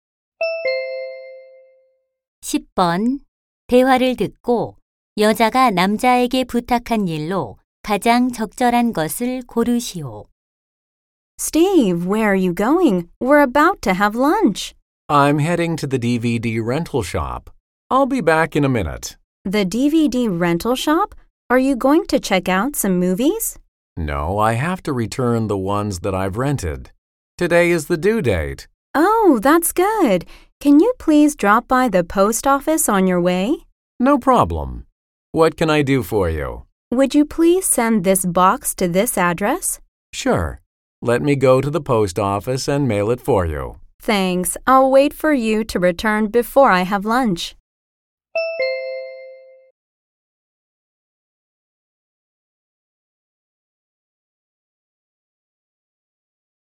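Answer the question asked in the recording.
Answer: 우체국에서 소포 부치기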